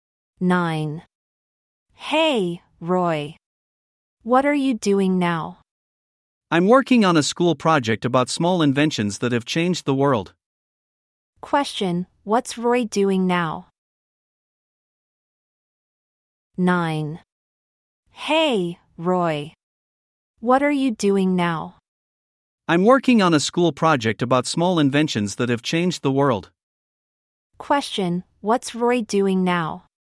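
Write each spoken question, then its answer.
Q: Question, what's Roy doing now?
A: Working on a school project about small inventions that have changed the world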